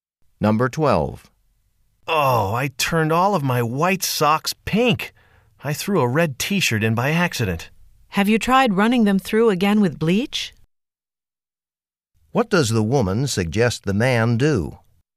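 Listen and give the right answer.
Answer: Wash the socks again with bleach.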